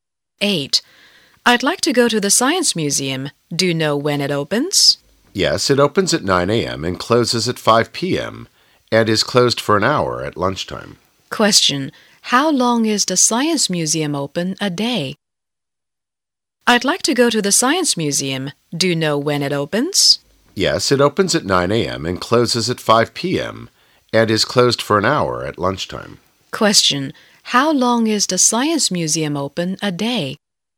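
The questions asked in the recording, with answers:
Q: Question. How long is the Science Museum open a day?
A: Seven hours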